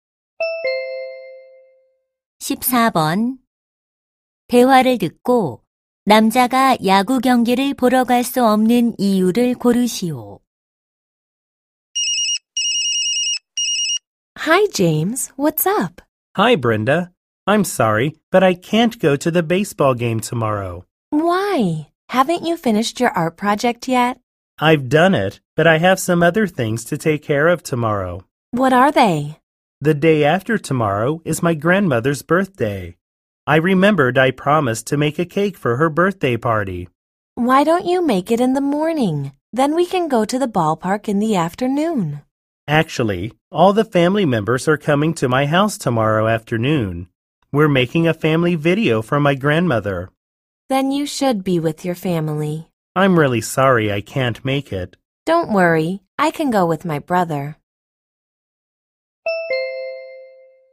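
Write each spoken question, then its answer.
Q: 대화를 듣고 남자가 야구 경기를 보러 갈 수 없는 이유를 고르시오.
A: 할머니를 위한 가족 영상을 만들어야 해서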